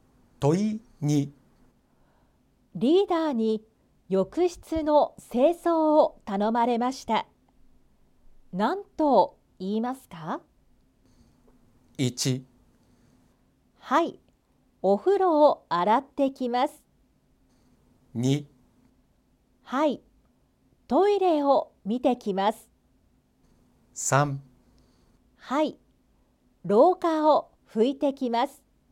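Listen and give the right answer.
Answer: 1: はい、お風呂を洗ってきます。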